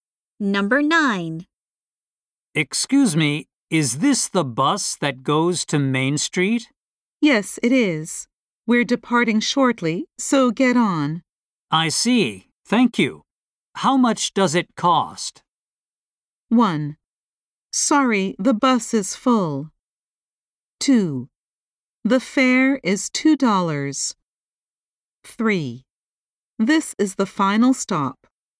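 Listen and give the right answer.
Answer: 2: The fare is $2.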